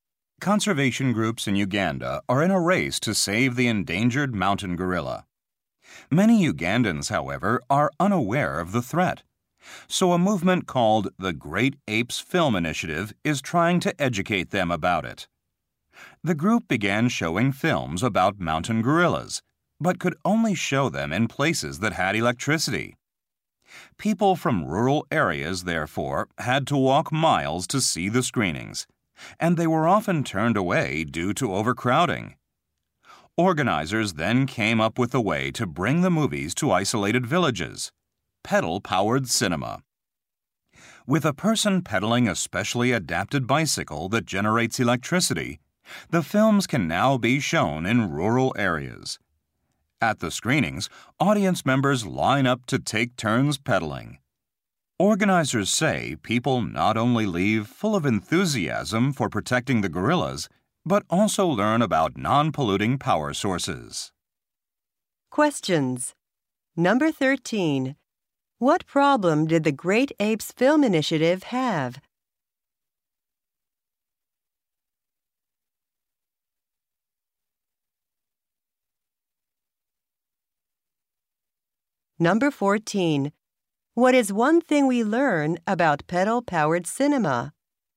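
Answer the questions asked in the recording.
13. It could only show films in places with electricity
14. Audiences take turns pedaling to make electricity and learn about clean power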